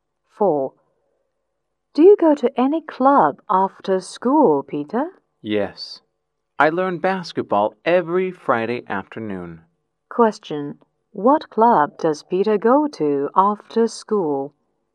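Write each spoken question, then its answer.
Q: What club does Peter go to after school?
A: The basketball club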